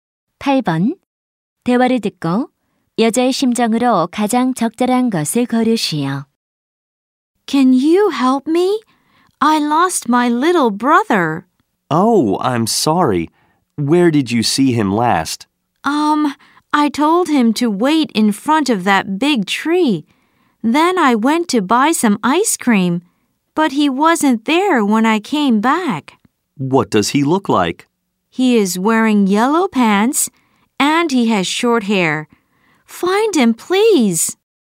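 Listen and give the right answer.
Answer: 걱정스러움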